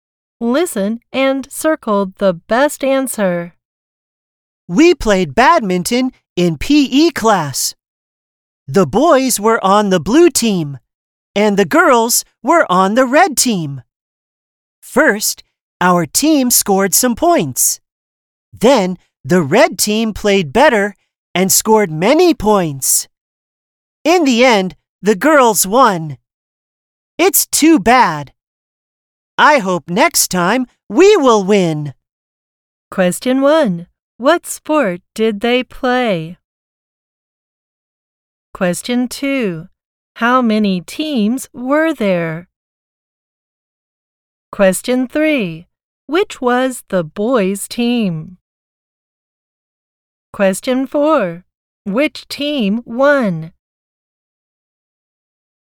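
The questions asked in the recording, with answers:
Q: What sport did they play?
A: Badminton

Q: How many teams were there?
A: Two

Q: Which was the boys' team?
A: The blue team

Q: Which team won?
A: The red team (the girls)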